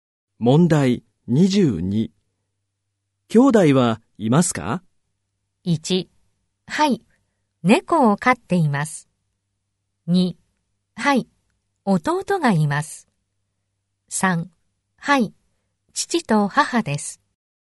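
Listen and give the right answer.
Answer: 2: はい、弟がいます。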